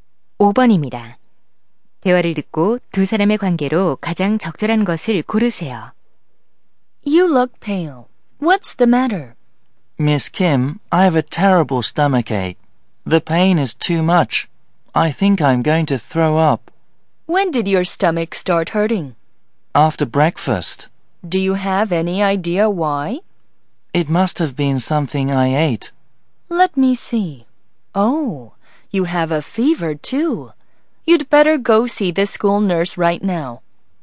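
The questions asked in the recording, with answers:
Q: 대화를 듣고 두 사람의 관계로 가장 적절한 것을 고르세요.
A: 선생님과 학생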